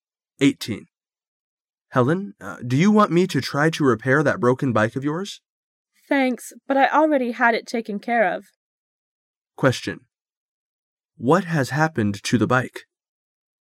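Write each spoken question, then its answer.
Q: What has happened to the bike?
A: It has already been repaired.

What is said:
[解析] M: Helen. Do you want me to try to repair that broken bike of yours? W: Thanks, but I already had it taken care of. Q: What has happened to the bike?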